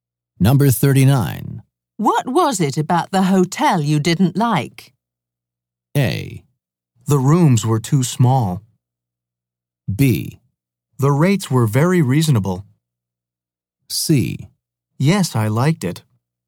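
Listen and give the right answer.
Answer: A: The rooms were too small.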